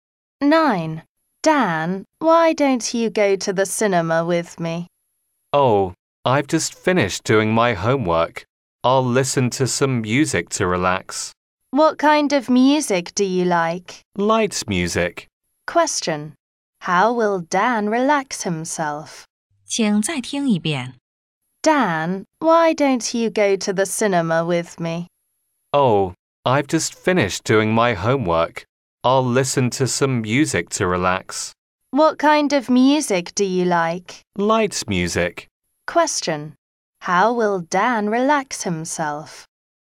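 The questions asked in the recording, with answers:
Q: How will Dan relax himself?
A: By listening to light music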